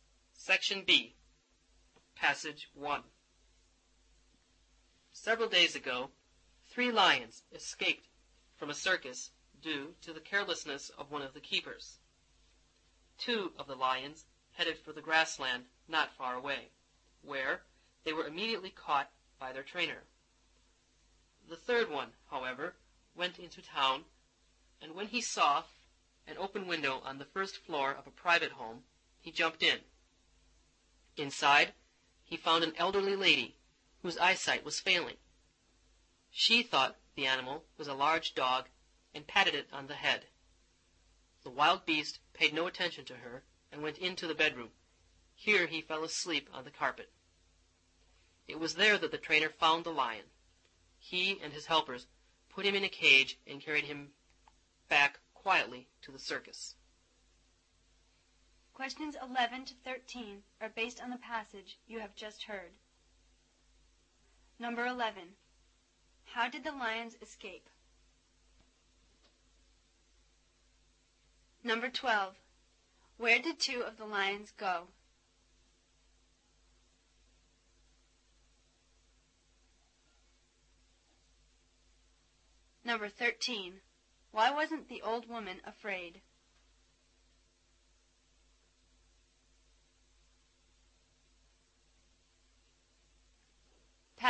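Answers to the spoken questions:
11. Because of a keeper's carelessness
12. To the grassland not far away
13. Her eyesight was failing and she thought it was a large dog.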